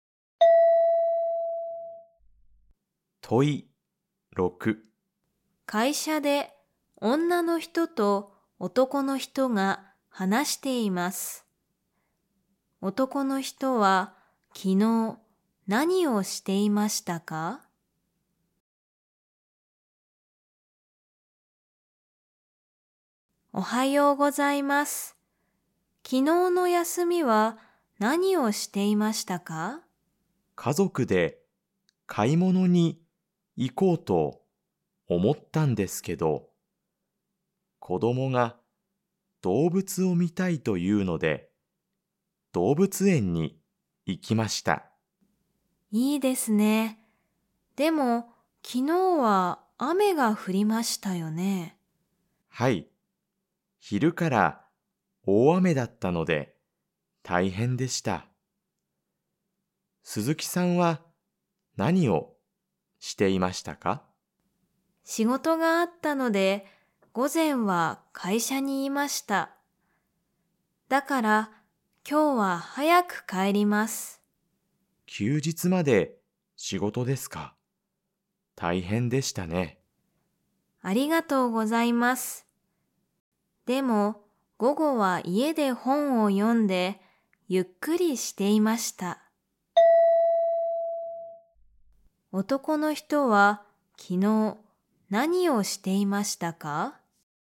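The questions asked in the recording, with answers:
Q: 男の人は昨日何をしていましたか?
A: 家族と動物園に行った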